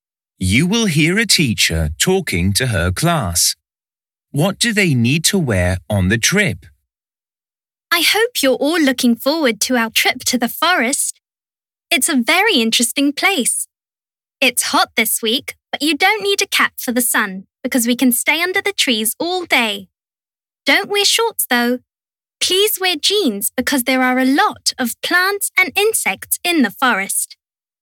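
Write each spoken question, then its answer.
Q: What do they need to wear on the trip?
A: jeans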